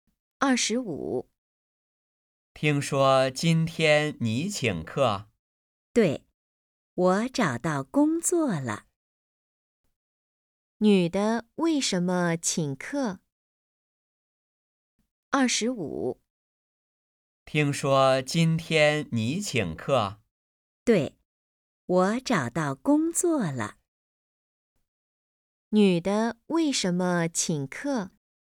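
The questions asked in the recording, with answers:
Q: 女的为什么请客?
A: 她找到工作了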